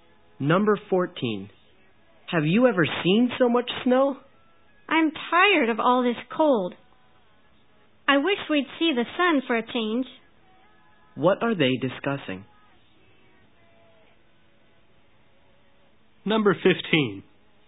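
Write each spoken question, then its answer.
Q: What are they discussing?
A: The weather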